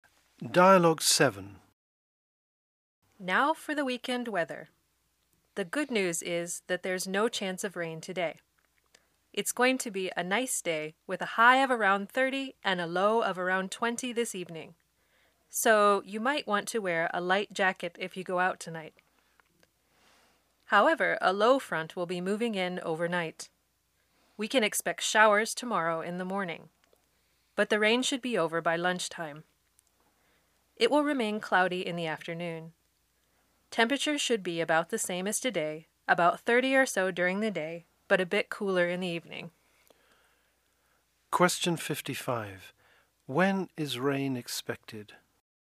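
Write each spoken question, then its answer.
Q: When is rain expected?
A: Tomorrow morning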